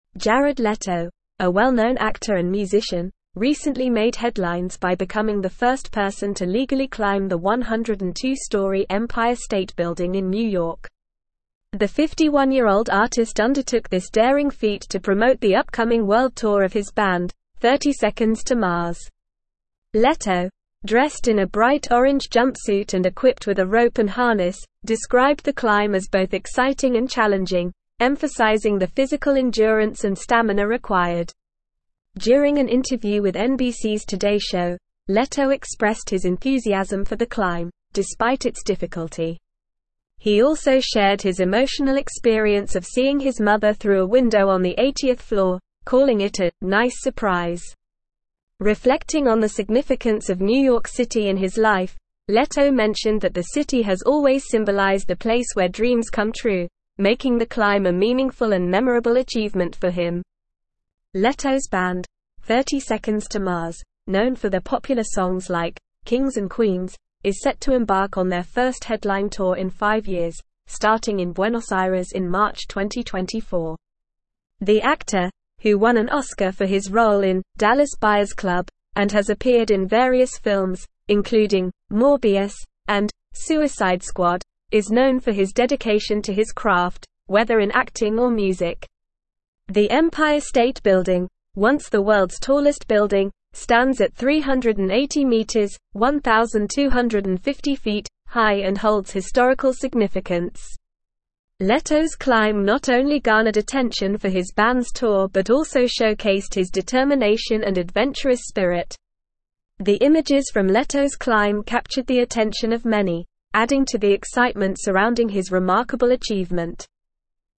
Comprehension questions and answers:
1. Jared Leto, a well-known actor and musician, recently made headlines by becoming the first person to legally climb the 102-storey Empire State (1)______ in New York.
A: Building

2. The 51-year-old artist undertook this (2)______ feat to promote the upcoming (3)______ tour of his band, Thirty Seconds To Mars.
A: daring

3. The 51-year-old artist undertook this (2)______ feat to promote the upcoming (3)______ tour of his band, Thirty Seconds To Mars.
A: world

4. Leto, dressed in a (4)______ orange jumpsuit and equipped with a rope and harness,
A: bright

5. During an interview with NBC's Today show, Leto expressed his enthusiasm for the climb, despite its (5)______.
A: difficulty

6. He also (6)______ his emotional experience of seeing his mother through a window on the 80th floor, calling it a "nice (7)______."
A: shared

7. He also (6)______ his emotional experience of seeing his mother through a window on the 80th floor, calling it a "nice (7)______."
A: surprise

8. (8)______ on the significance of New York City in his life, Leto mentioned that the city has always symbolized a place where dreams come true, (9)______ the climb a (10)______ and memorable achievement for him.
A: Reflecting

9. (8)______ on the significance of New York City in his life, Leto mentioned that the city has always symbolized a place where dreams come true, (9)______ the climb a (10)______ and memorable achievement for him.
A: making

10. (8)______ on the significance of New York City in his life, Leto mentioned that the city has always symbolized a place where dreams come true, (9)______ the climb a (10)______ and memorable achievement for him.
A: meaningful

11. Leto's band, Thirty Seconds To Mars, (11)______ for their popular songs like "Kings and Queens," is set to embark on their first headline tour in five years, (12)______ in Buenos Aires in March 2024.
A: known

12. Leto's band, Thirty Seconds To Mars, (11)______ for their popular songs like "Kings and Queens," is set to embark on their first headline tour in five years, (12)______ in Buenos Aires in March 2024.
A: starting

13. is known for his dedication to his craft, whether in acting or (13)______.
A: music

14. The (14)______ State Building, once the world's tallest building, stands at 380m (1,250ft) high and holds historical significance.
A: Empire

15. Leto's climb not only garnered (15)______ for his band's tour but also showcased his determination and adventurous spirit.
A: attention

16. The images from Leto's climb captured the attention of many, (16)______ to the excitement surrounding his remarkable achievement.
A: adding

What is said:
Jared Leto, a well-known actor and musician, recently made headlines by becoming the first person to legally climb the 102-storey Empire State Building in New York. The 51-year-old artist undertook this daring feat to promote the upcoming world tour of his band, Thirty Seconds To Mars. Leto, dressed in a bright orange jumpsuit and equipped with a rope and harness, described the climb as both exciting and challenging, emphasizing the physical endurance and stamina required.
During an interview with NBC's Today show, Leto expressed his enthusiasm for the climb, despite its difficulty. He also shared his emotional experience of seeing his mother through a window on the 80th floor, calling it a "nice surprise." Reflecting on the significance of New York City in his life, Leto mentioned that the city has always symbolized a place where dreams come true, making the climb a meaningful and memorable achievement for him.
Leto's band, Thirty Seconds To Mars, known for their popular songs like "Kings and Queens," is set to embark on their first headline tour in five years, starting in Buenos Aires in March 2024. The actor, who won an Oscar for his role in "Dallas Buyers Club" and has appeared in various films, including "Morbius" and "Suicide Squad," is known for his dedication to his craft, whether in acting or music.
The Empire State Building, once the world's tallest building, stands at 380m (1,250ft) high and holds historical significance. Leto's climb not only garnered attention for his band's tour but also showcased his determination and adventurous spirit. The images from Leto's climb captured the attention of many, adding to the excitement surrounding his remarkable achievement.

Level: Level 4